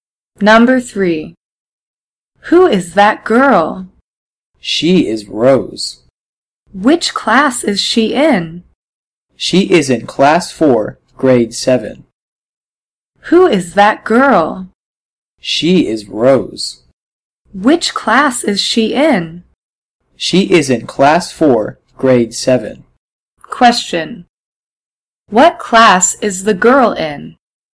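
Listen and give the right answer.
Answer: Class 4, Grade 7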